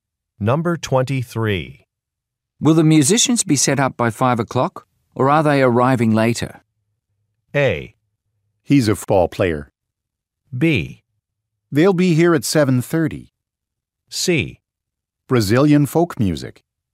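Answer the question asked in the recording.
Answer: B: They'll be here at 7:30.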